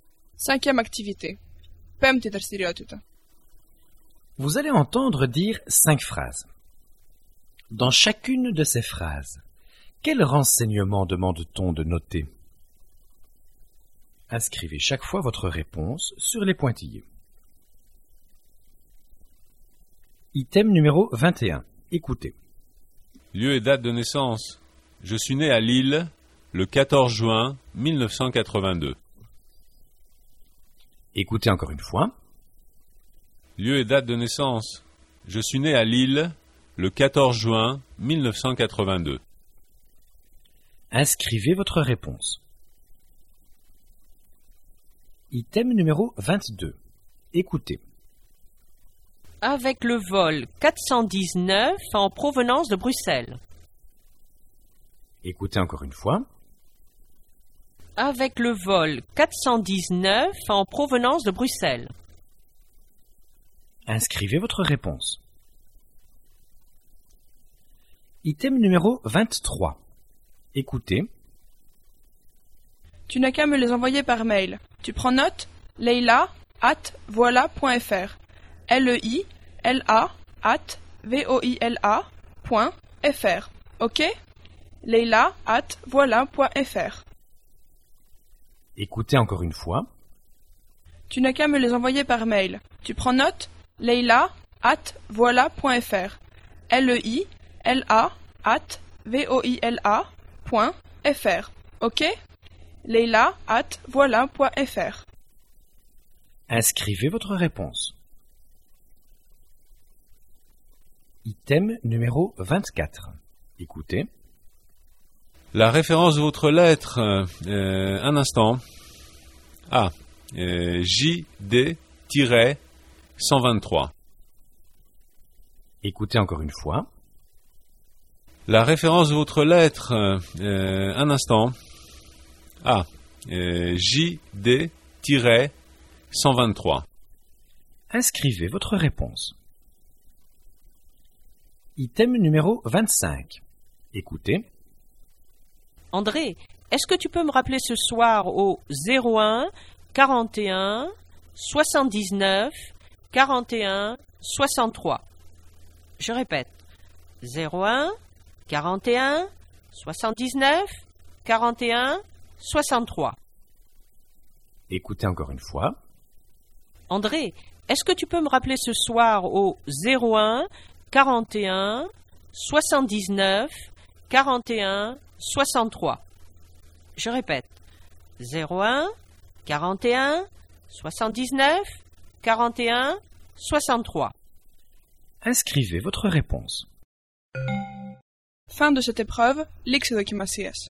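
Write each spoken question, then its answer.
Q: Dans chacune de ces phrases, quel renseignement demande-t-on de noter ?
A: Lieu et date de naissance (Lille, 14 juin 1982)

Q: Dans chacune de ces phrases, quel renseignement demande-t-on de noter ?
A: Adresse e-mail (leila@voila.fr)

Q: Dans chacune de ces phrases, quel renseignement demande-t-on de noter ?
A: Référence de la lettre (JD-123)

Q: Dans chacune de ces phrases, quel renseignement demande-t-on de noter ?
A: Numéro de téléphone (01 41 79 41 63)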